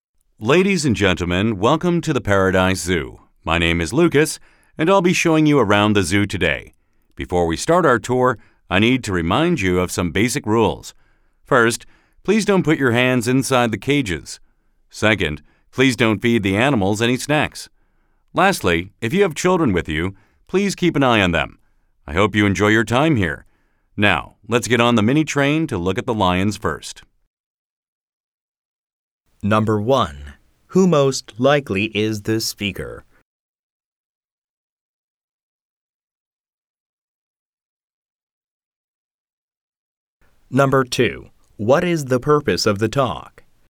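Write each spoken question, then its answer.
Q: Who most likely is the speaker?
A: A zoo guide

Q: What is the purpose of the talk?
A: To welcome visitors and remind them of the zoo's rules before the tour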